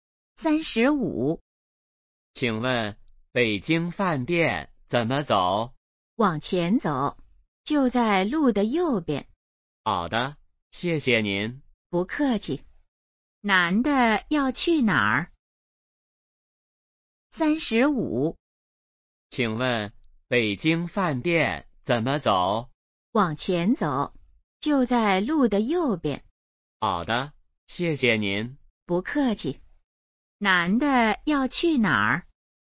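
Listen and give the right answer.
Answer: 北京饭店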